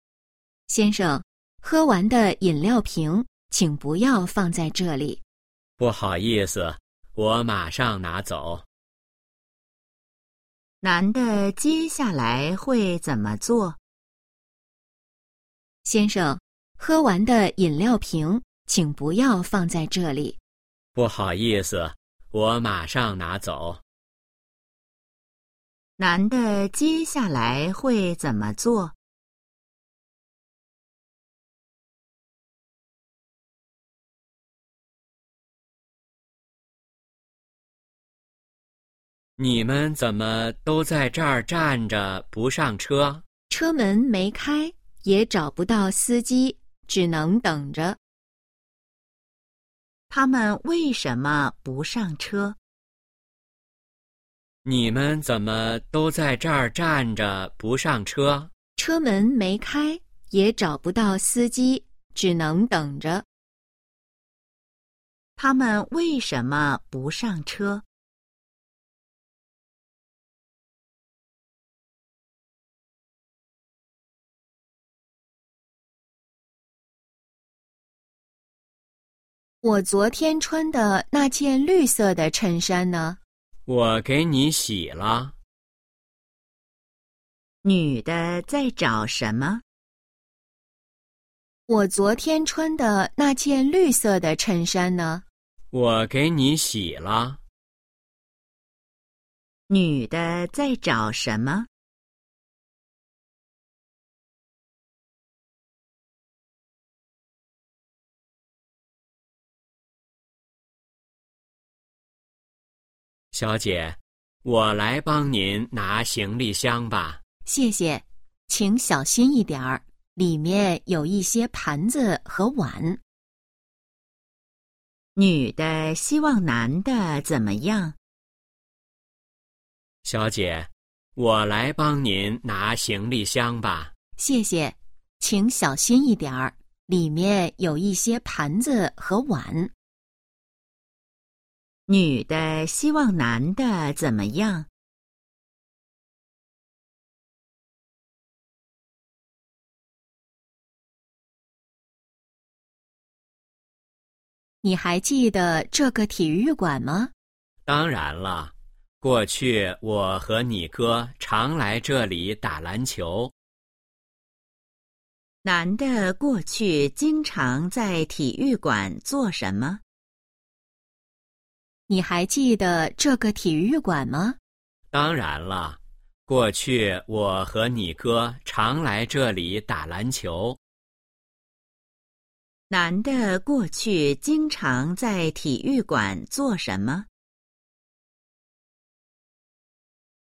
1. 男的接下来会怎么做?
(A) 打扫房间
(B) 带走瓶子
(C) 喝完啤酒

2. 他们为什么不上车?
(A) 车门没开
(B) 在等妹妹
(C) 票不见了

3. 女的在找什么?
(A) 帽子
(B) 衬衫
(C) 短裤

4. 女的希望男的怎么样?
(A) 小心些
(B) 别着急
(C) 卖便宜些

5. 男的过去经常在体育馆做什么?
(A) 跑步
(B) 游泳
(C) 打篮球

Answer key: 1B, 2A, 3B, 4A, 5C

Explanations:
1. 女:先生,喝完的饮料瓶请不要放在这里。 男:不好意思,我马上拿走。
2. 男:你们怎么都在这儿站着不上车? 女:车门没开,也找不到司机,只能等着。
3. 女:我昨天穿的那件绿色的衬衫呢? 男:我给你洗了。
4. 男:小姐,我来帮您拿行李箱吧。 女:谢谢。请小心一点儿,里面有一些盘子和碗。
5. 女:你还记得这个体育馆吗? 男:当然了,过去我和你哥常来这里打篮球。

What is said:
女:先生,喝完的饮料瓶请不要放在这里。
男:不好意思,我马上拿走。
问:男的接下来会怎么做?
男:你们怎么都在这儿站着不上车?
女:车门没开,也找不到司机,只能等着。
问:他们为什么不上车?
女:我昨天穿的那件绿色的衬衫呢?
男:我给你洗了。
问:女的在找什么?
男:小姐,我来帮您拿行李箱吧。
女:谢谢。请小心一点儿,里面有一些盘子和碗。
问:女的希望男的怎么样?
女:你还记得这个体育馆吗?
男:当然了,过去我和你哥常来这里打篮球。
问:男的过去经常在体育馆做什么?

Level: 汉语水平考试(HSK)三级

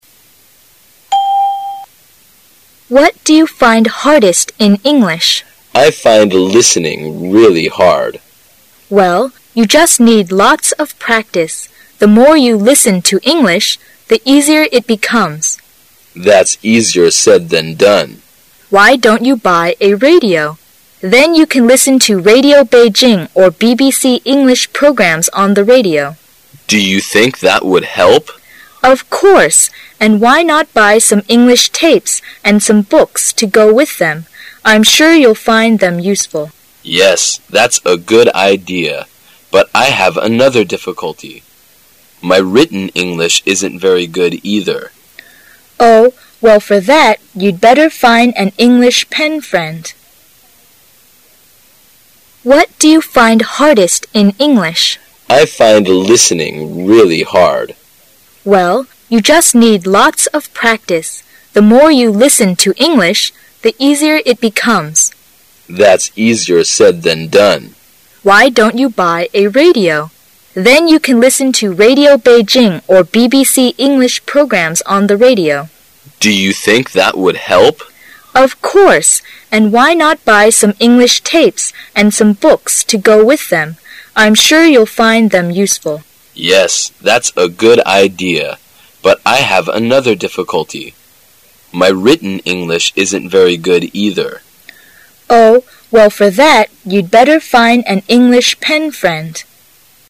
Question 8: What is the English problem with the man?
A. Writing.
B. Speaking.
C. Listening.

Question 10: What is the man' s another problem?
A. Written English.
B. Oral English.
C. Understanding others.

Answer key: 8C, 10A

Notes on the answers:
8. 对话中,男士提到他觉的英语最难的是听力。故本题答案为C。
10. 对话的最后两句,男士说到自己的写作也很不好。故本题答案为A。

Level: 公共英语二级

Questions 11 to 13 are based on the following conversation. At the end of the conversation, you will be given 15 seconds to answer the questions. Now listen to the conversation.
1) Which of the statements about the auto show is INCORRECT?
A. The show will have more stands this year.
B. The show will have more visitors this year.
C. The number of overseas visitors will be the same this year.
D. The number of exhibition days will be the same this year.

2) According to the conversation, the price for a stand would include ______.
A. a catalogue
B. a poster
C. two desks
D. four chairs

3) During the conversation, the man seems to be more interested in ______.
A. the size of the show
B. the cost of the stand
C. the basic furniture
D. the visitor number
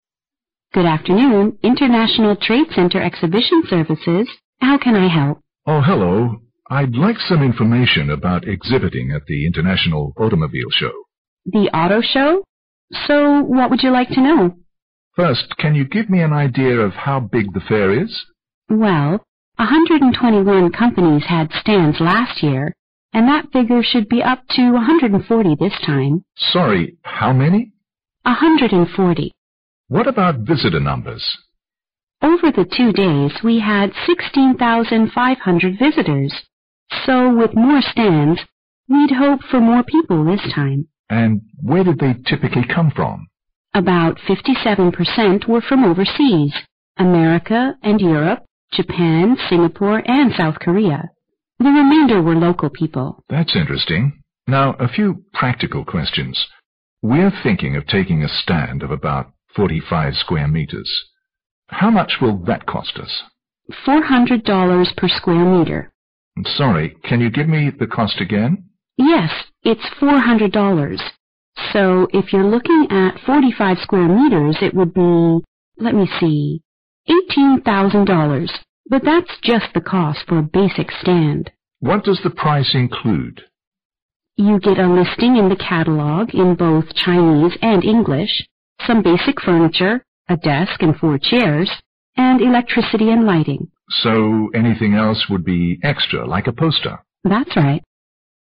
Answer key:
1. C
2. D
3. B

